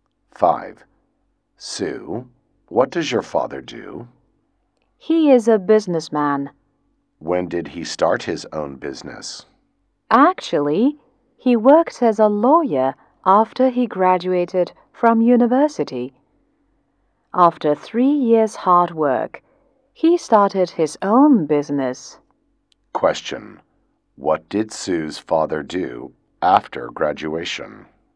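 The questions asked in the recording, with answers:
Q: What did Sue's father do after graduation?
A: He worked as a lawyer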